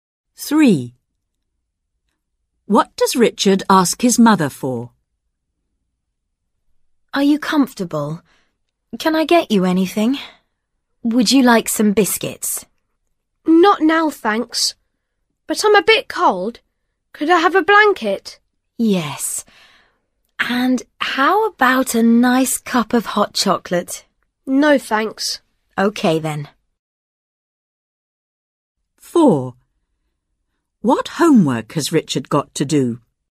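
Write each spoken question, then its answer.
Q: What does Richard ask his mother for?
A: A blanket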